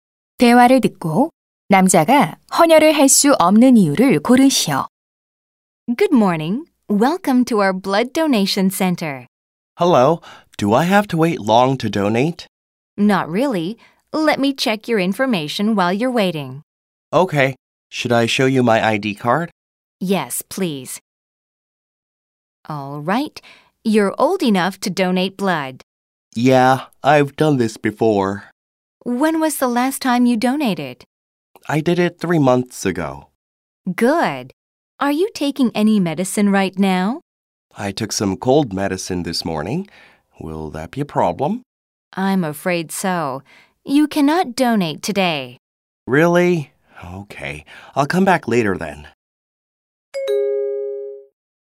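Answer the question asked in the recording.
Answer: 오늘 아침에 감기약을 먹어서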